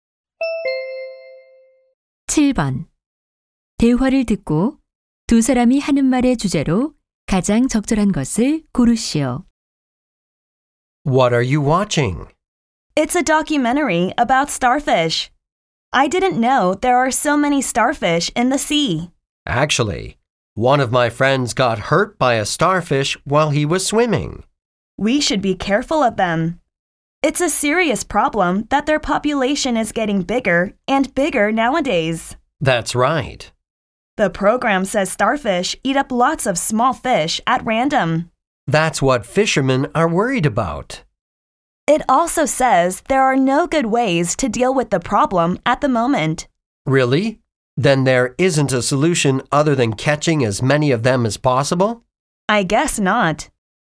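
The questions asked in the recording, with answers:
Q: 대화를 듣고 두 사람이 하는 말의 주제로 가장 적절한 것을 고르시오.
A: 불가사리 개체 수 증가 문제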